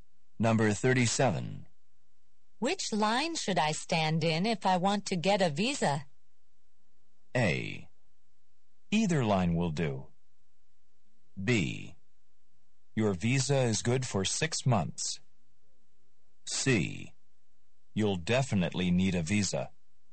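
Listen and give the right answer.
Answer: A: Either line will do.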